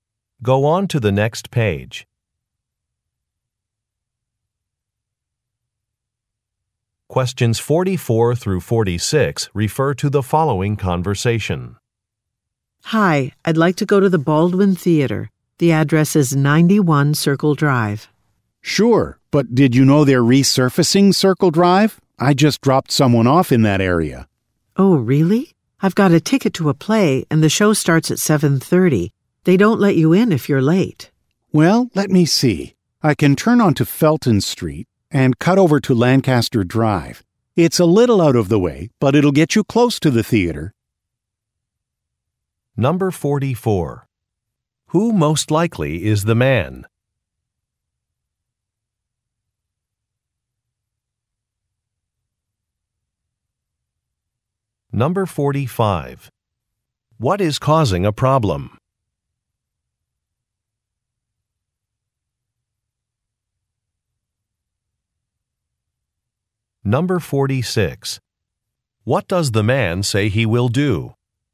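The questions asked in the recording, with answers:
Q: Who most likely is the man?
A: A taxi driver

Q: What is causing a problem?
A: Circle Drive is being resurfaced

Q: What does the man say he will do?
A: Take a different route via Felton Street and Lancaster Drive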